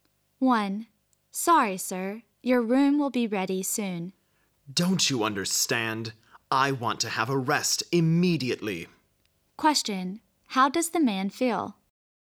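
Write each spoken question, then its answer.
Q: How does the man feel?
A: Impatient and annoyed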